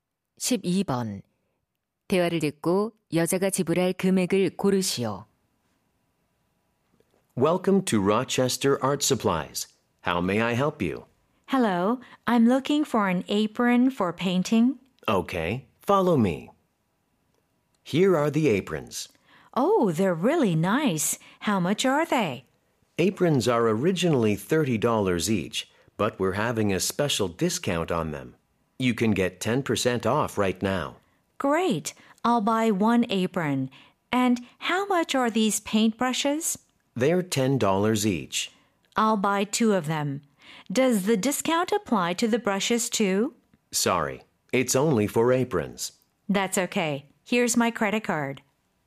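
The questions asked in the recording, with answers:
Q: 대화를 듣고 여자가 지불할 금액을 고르시오.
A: $47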